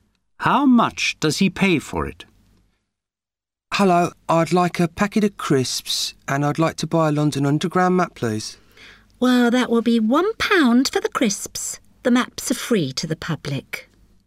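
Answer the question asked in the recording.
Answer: Nothing; the map is free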